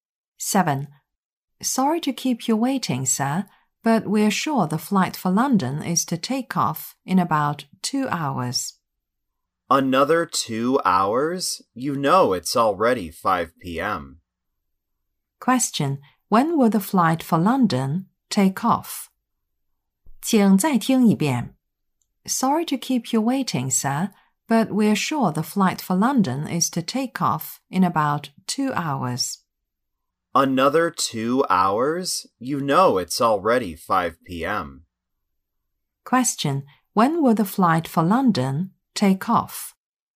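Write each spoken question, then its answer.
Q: When will the flight for London take off?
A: At about 7 p.m.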